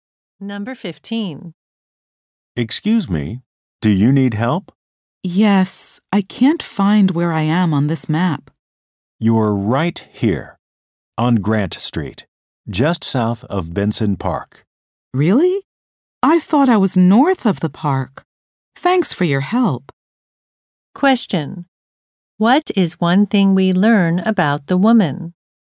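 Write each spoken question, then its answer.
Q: What is one thing we learn about the woman?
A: She was wrong about where she was; she is south of Benson Park.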